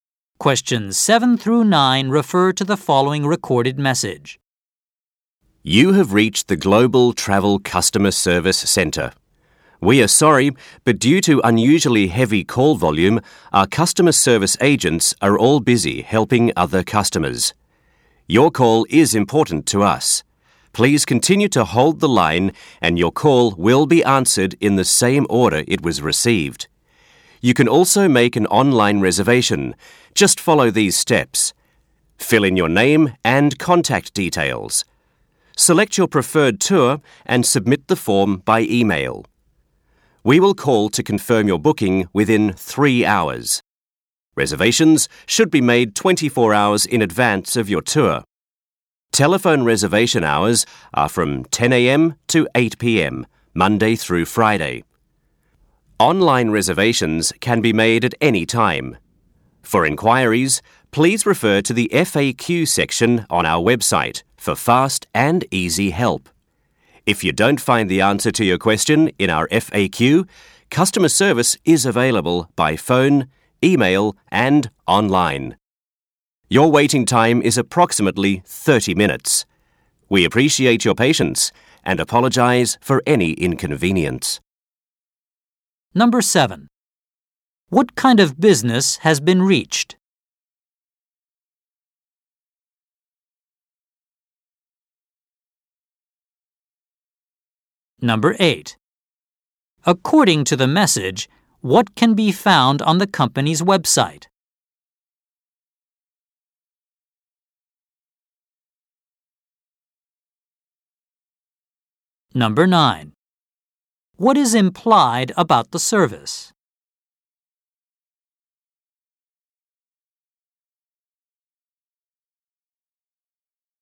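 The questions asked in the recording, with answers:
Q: What kind of business has been reached?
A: A travel agency

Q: According to the message, what can be found on the company's website?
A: An FAQ section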